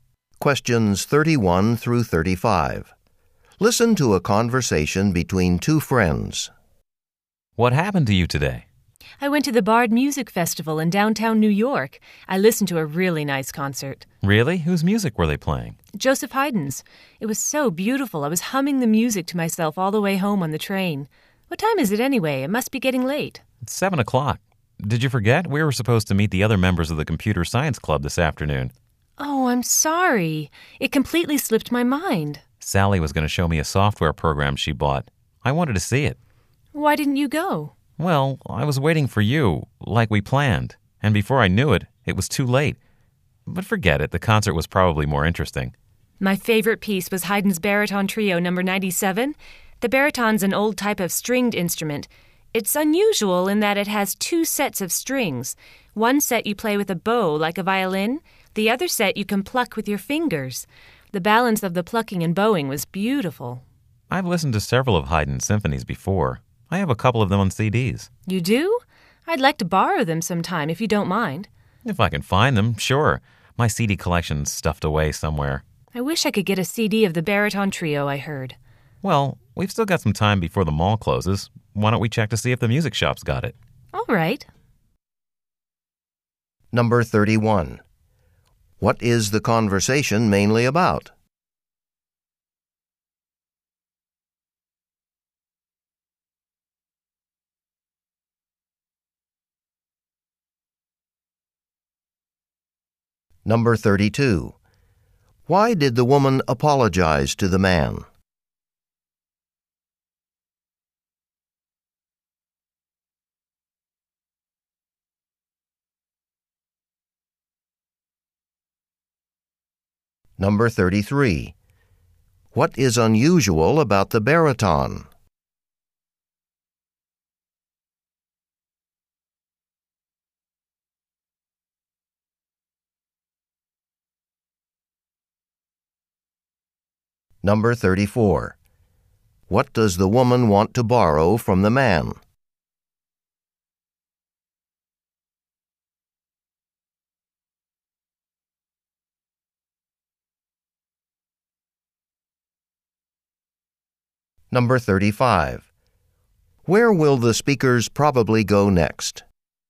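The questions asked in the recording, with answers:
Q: Why did the woman apologize to the man?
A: She forgot that they were supposed to meet the Computer Science Club.

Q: What is unusual about the baritone?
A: It has two sets of strings.

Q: What does the woman want to borrow from the man?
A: His CDs of Haydn symphonies.

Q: Where will the speakers probably go next?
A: To the music shop at the mall.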